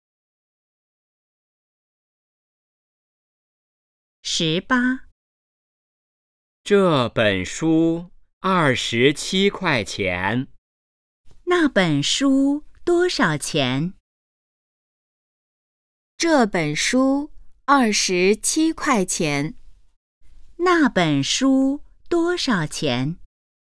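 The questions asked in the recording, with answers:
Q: 那本书多少钱?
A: 27块钱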